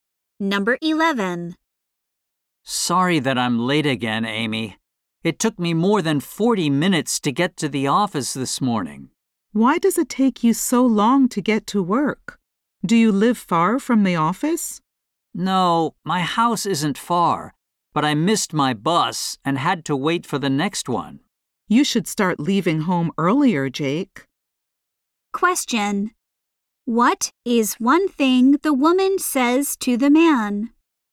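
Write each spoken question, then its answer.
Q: What is one thing the woman says to the man?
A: He should leave home earlier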